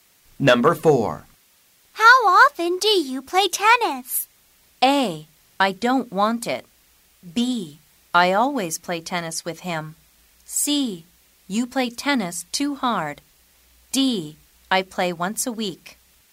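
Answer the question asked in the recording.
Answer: D: I play once a week.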